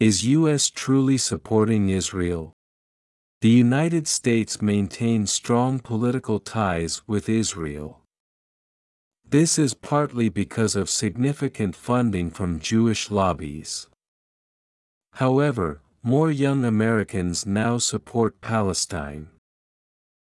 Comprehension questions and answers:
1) The United States ( ) Israel.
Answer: maintains strong political ties with

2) This is ( ) Jewish lobbies.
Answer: partly because of significant funding from

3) However, 3( ) Palestine.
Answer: more young Americans now support

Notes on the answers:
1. The United States maintains strong:maintains」の語尾「」を落として「maintain」とした人は、以下の2点に注意しましょう。 1)主語の「The United States(アメリカ合衆国)」は「States」が複数形ですが、「1つの国」を表すため単数の主語とみなします。同様に「the United Nations(国際連合)」も単数扱いです。 2)「maintains」の語尾の[z]と 直後の単語「strong」の語頭の[s]は、同じ子音の有声音と無声音が続きます。 このような場合は[z][s]と2つの子音をわざわざ別々に発音せず、前の子音([z])がほぼ脱落して後ろの子音([s])を長めに発音します。2つの子音を1つにまとめるイメージです。 maintains」の語尾の「s」を発音していないように聞こえるため、「maintain strong」「maintains strong」の違いを音だけで聞き分けるのは困難です。 が、「The United States」が三人称単数なので、動詞には三単現のSが付いて「maintains」となることがわかります。文法力があれば正解できる問題です。
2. This is partly because of significant fundingsignificant funding」が名詞句なので、直前に「because of」と前置詞句を置く必要があります。 前置詞「of」を落とすと「because」が接続詞となり、後に「主語+動詞」の節を続けないと文法的に通りません。 ◯ This is partly because significant funding was donated by Jewish lobbies. = 接続詞の後に「主語+動詞の節」が続く正しい英文。 ☓ This is partly because significant funding from Jewish lobbies. = 接続詞の後が「名詞(主語)」だけで終わっている不完全な英文。 また、「of」を不定冠詞の「a」と聞き間違えた人は、上記の文法事項に加えて、「funding」が不可算名詞であることを覚えておきましょう。
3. やさしい設問だったので、さすがに提出者のほぼ全員が正解でした。 唯一、「now」を書き忘れるケアレス・ミスで不正解となった人がいます。 副詞の「now(現在)」は、この英文の中では一般動詞「support」の直前、または文頭か文末に置くのが自然です。

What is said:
Is U.S. Truly Supporting Israel?
The United States (maintains strong political ties with) Israel. This is (partly because of significant funding from) Jewish lobbies. However, 3(more young Americans now support) Palestine.

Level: 英検2級・TOEIC550点以上